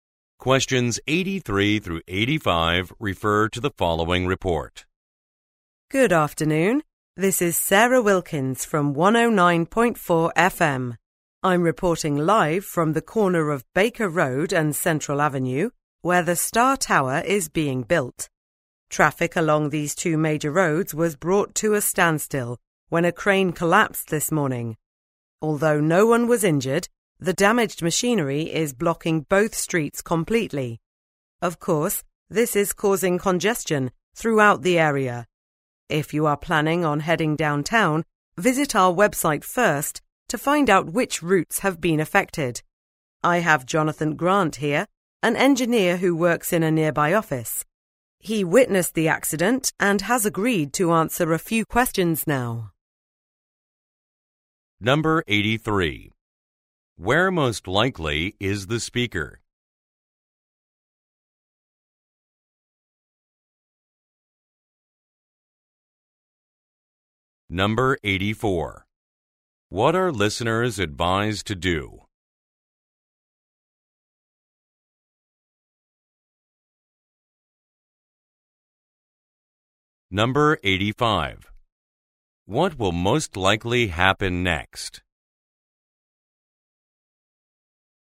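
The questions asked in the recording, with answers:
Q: Where most likely is the speaker?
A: At a construction site (corner of Baker Road and Central Avenue)

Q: What are listeners advised to do?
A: Visit the radio station's website to check affected routes

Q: What will most likely happen next?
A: An engineer who witnessed the accident will be interviewed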